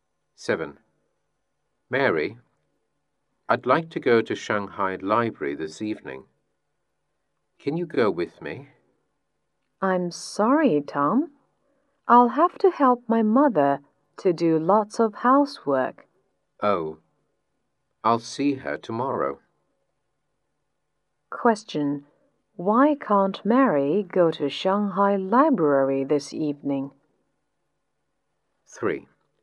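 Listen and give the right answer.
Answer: She has to help her mother with lots of housework.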